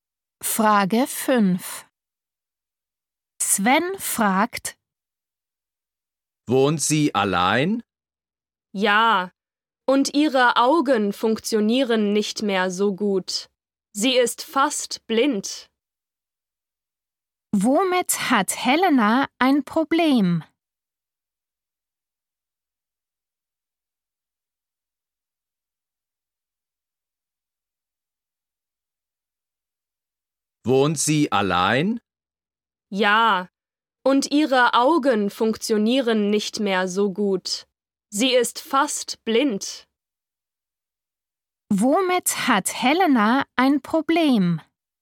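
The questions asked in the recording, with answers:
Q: Womit hat Helena ein Problem?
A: mit den Augen (sie ist fast blind)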